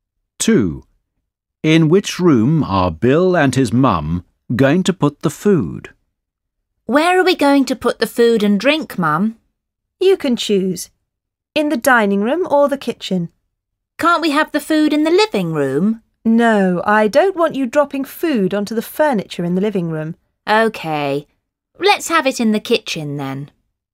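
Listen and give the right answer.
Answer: The kitchen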